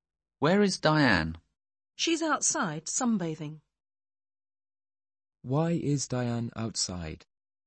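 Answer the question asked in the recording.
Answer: She is sunbathing.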